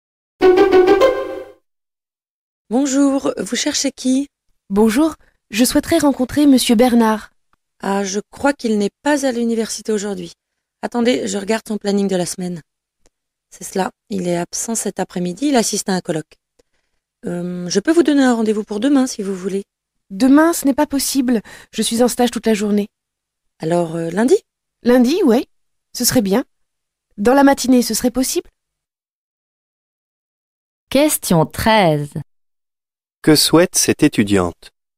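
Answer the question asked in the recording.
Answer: Obtenir un rendez-vous avec Monsieur Bernard.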